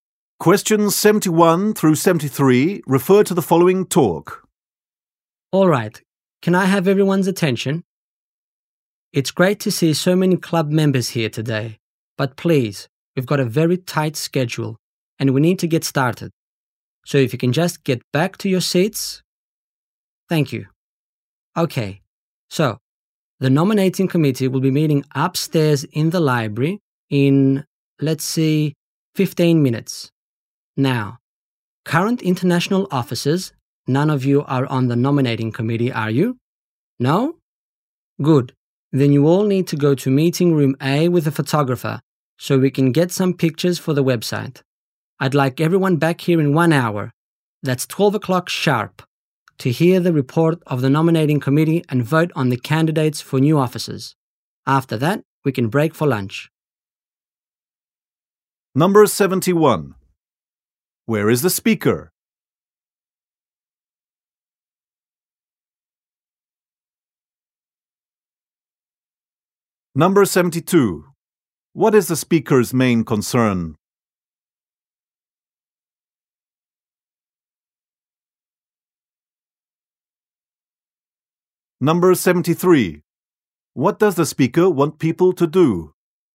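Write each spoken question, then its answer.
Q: What is the speaker's main concern?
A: Keeping to a tight schedule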